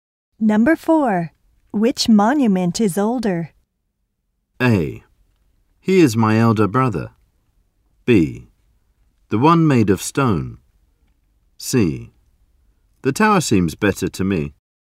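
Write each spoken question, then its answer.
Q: Which monument is older?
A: B: The one made of stone.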